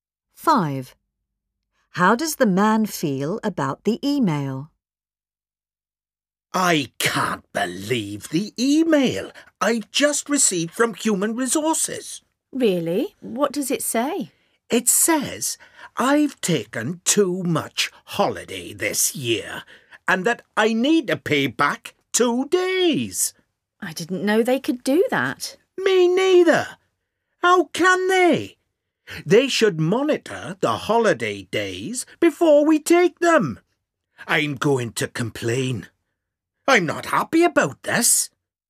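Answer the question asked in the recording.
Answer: Unhappy; he is going to complain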